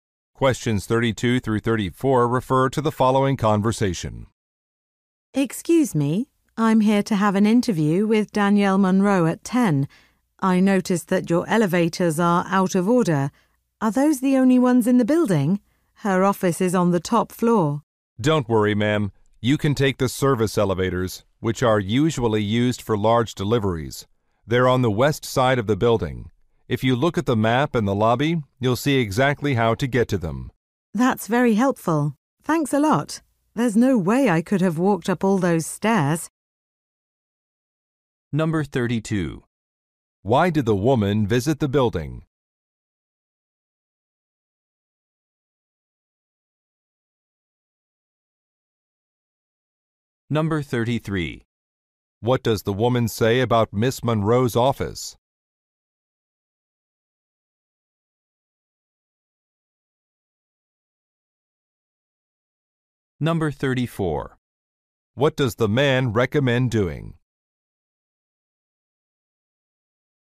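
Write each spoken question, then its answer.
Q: Why did the woman visit the building?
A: To have an interview with Danielle Munro

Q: What does the woman say about Miss Munro's office?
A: It is on the top floor

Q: What does the man recommend doing?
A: Taking the service elevators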